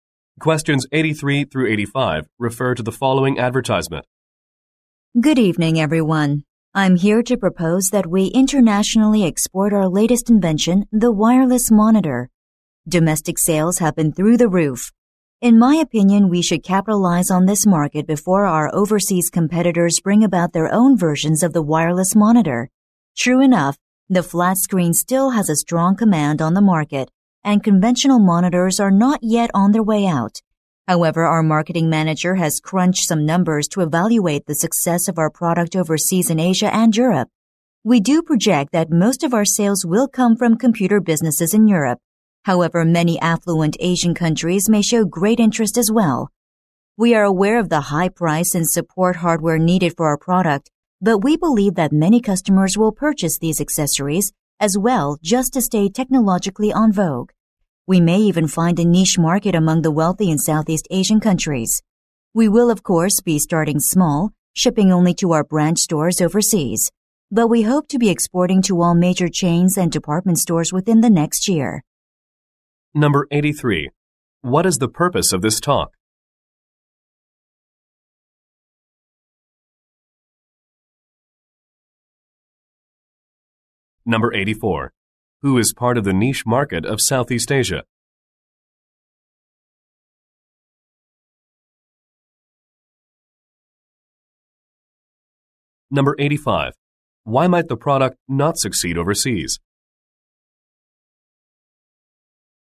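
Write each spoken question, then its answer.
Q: What is the purpose of this talk?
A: To propose exporting the wireless monitor internationally

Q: Who is part of the niche market of Southeast Asia?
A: The wealthy

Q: Why might the product not succeed overseas?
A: Its high price and the support hardware needed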